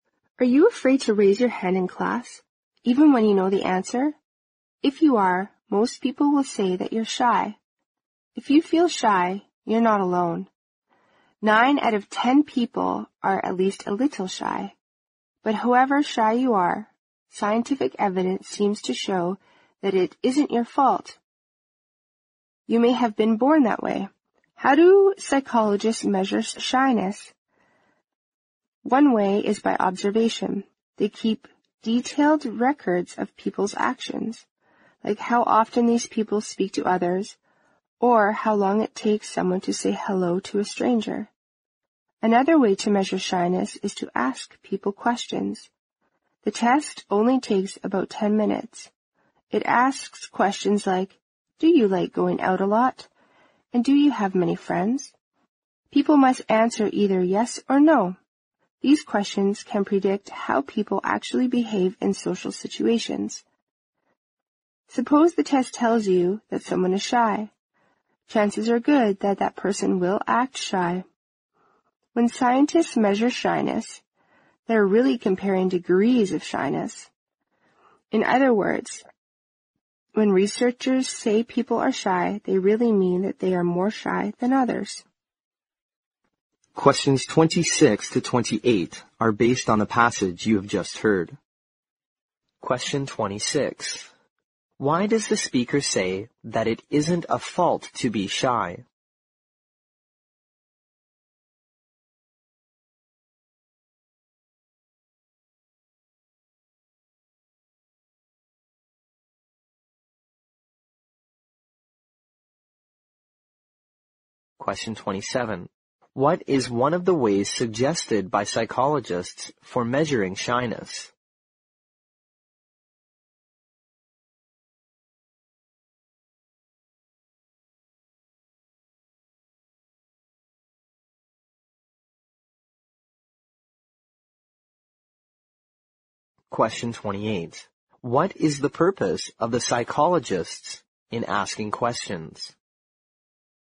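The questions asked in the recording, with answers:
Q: Why does the speaker say that it isn't a fault to be shy?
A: Because you may have been born that way.

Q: What is one of the ways suggested by psychologists for measuring shyness?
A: Observation (or asking people questions).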